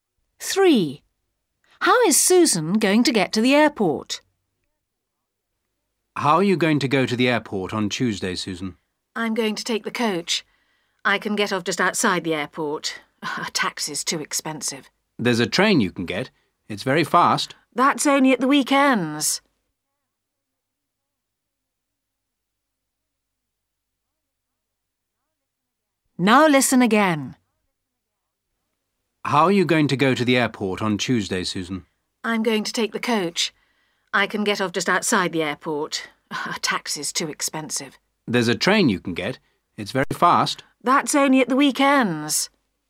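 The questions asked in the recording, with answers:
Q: How is Susan going to get to the airport?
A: By coach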